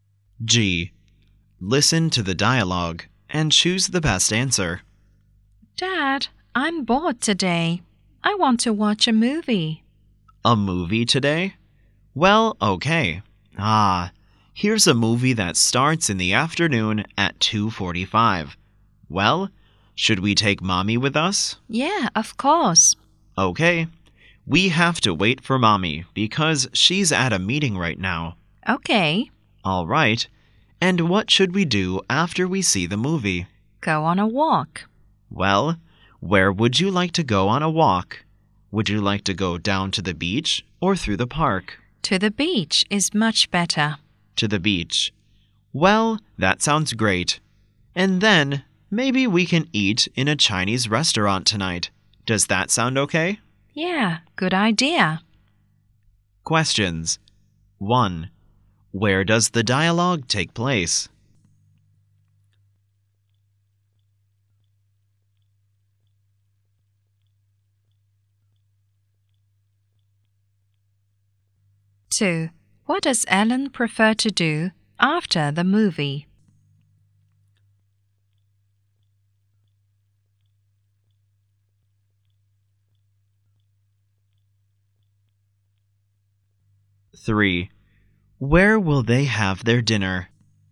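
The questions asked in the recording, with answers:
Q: What does Ellen prefer to do after the movie?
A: Go on a walk to the beach

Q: Where will they have their dinner?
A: In a Chinese restaurant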